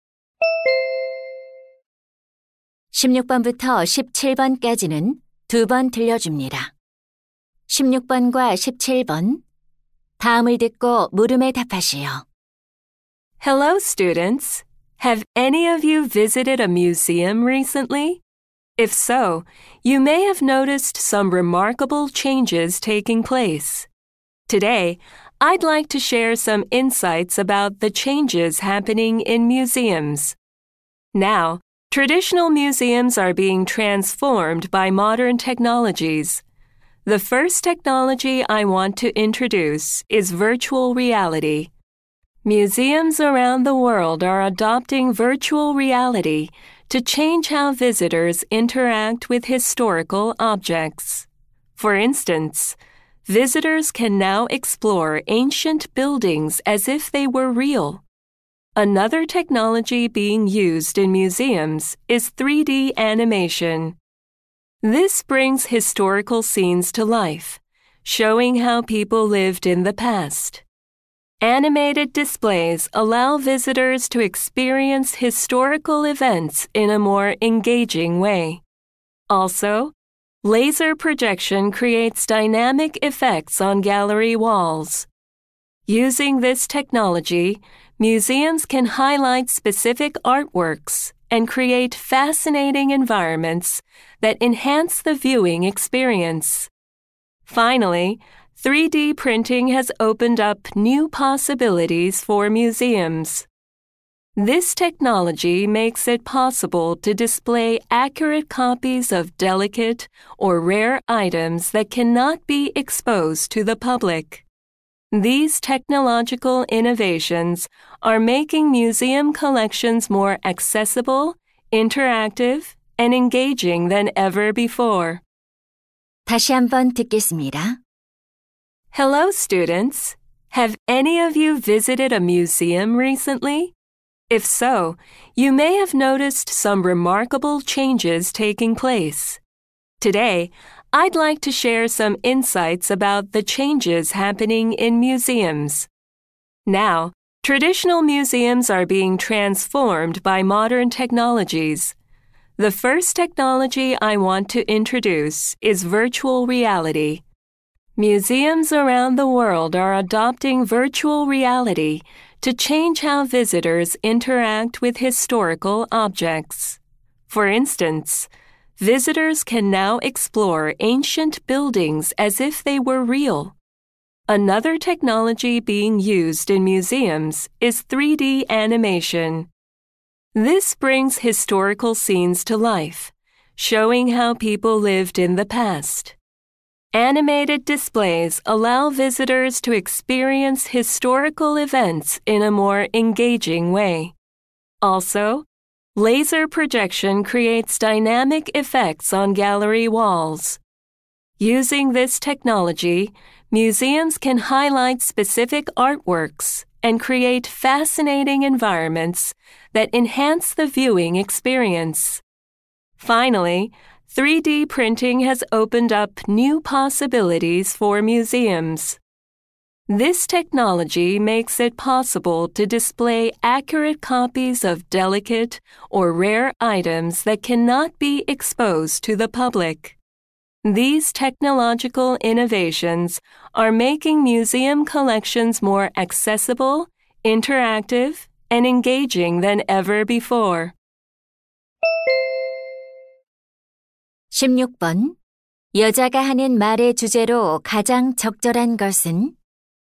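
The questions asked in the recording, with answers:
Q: 여자가 하는 말의 주제로 가장 적절한 것은?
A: 현대 기술이 박물관을 변화시키는 방식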